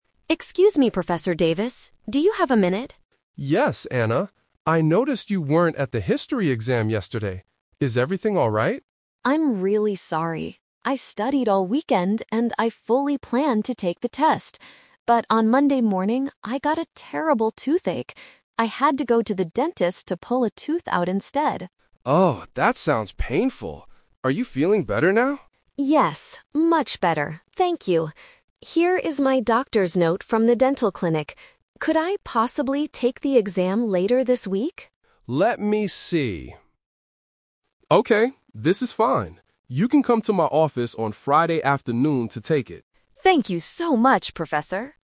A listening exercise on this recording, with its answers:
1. Why did Anna miss the exam yesterday?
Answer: She had to go to the dentist for a bad tooth.

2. What did Anna originally plan to do on Monday morning?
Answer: Take her history exam.

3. What does the professor agree to let Anna do?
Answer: Take the exam on Friday.

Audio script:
Student: Excuse me, Professor Davis. Do you have a minute?
Professor: Yes, Anna. I noticed you weren't at the history exam yesterday. Is everything alright?
Student: I'm really sorry. I studied all weekend and I fully planned to take the test. But on Monday morning, I got a terrible toothache. I had to go to the dentist to pull a tooth out instead.
Professor: Oh, that sounds painful. Are you feeling better now?
Student: Yes, much better, thank you. Here is my doctor's note from the dental clinic. Could I possibly take the exam later this week?
Professor: Let me see... Okay, this is fine. You can come to my office on Friday afternoon to take it.